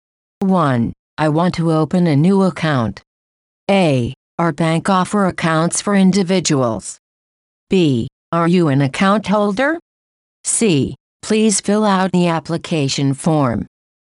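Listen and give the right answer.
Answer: C: Please fill out the application form.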